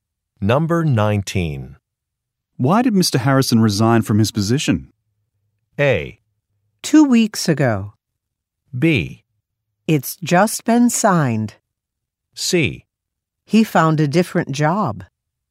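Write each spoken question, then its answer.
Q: Why did Mr. Harrison resign from his position?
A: C: He found a different job.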